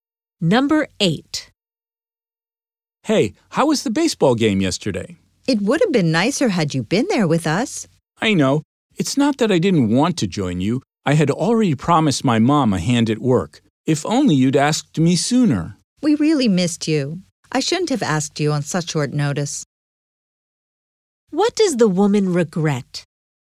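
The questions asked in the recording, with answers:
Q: What does the woman regret?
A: Asking him to the game at such short notice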